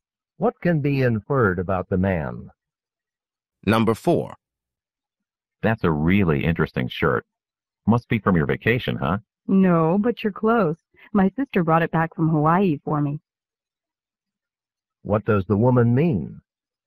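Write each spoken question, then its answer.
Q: What does the woman mean?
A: The shirt is from Hawaii, but it was a gift from her sister, not from her own vacation.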